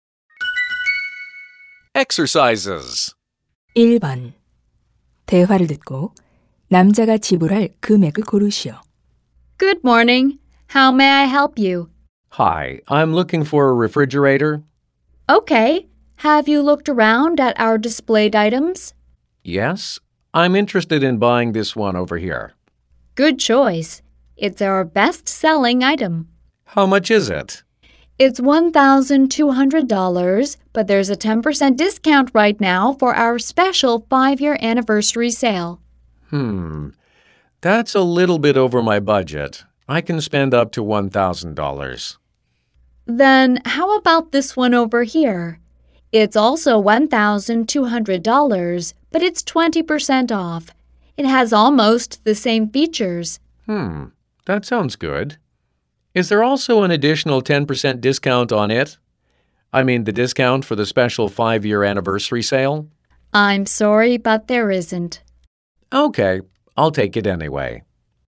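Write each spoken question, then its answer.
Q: 대화를 듣고 남자가 지불할 금액을 고르시오.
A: $960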